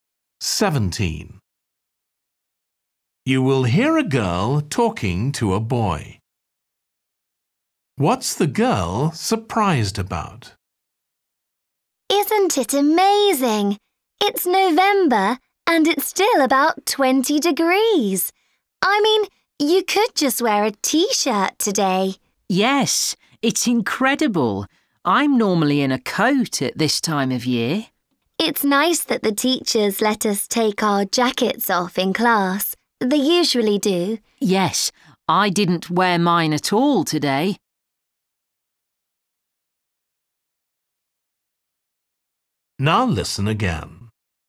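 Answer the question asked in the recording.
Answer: How warm it is in November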